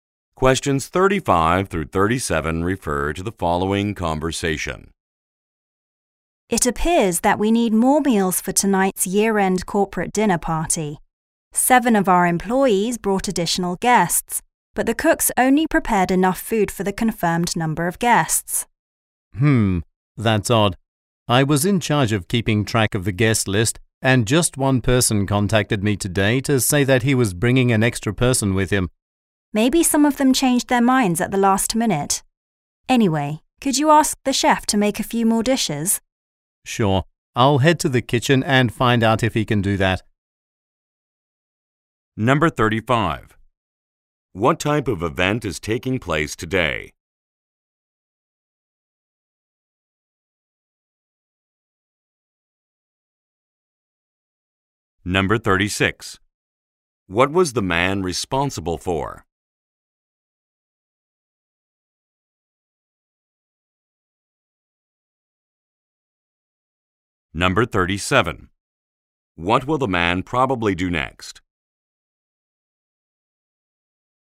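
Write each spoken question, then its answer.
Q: What type of event is taking place today?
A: A year-end corporate dinner party

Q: What was the man responsible for?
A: Keeping track of the guest list

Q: What will the man probably do next?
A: Go to the kitchen to ask the chef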